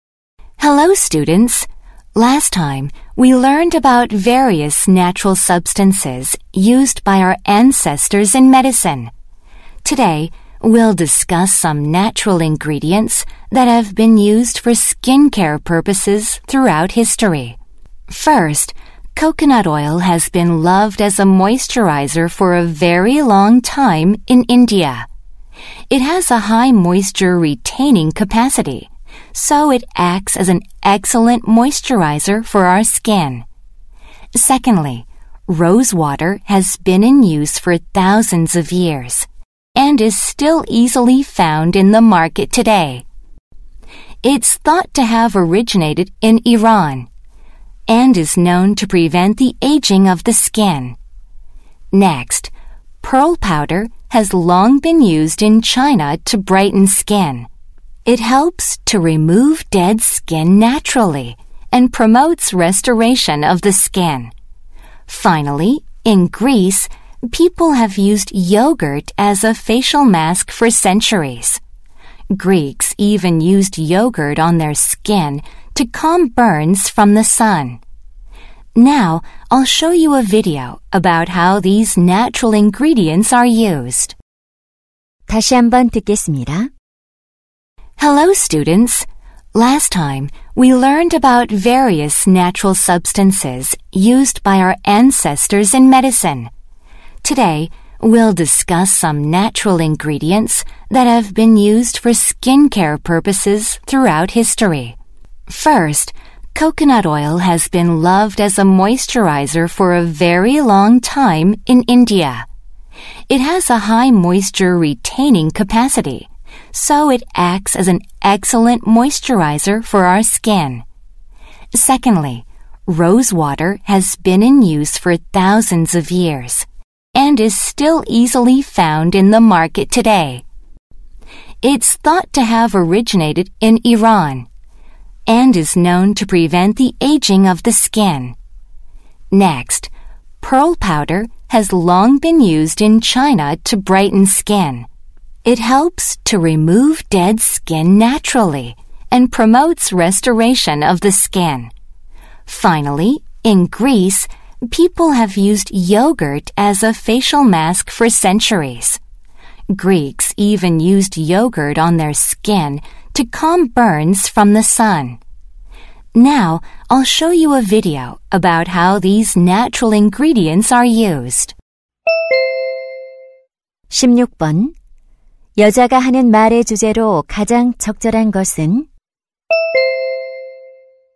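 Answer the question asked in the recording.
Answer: 역사적으로 피부 관리에 사용된 천연 재료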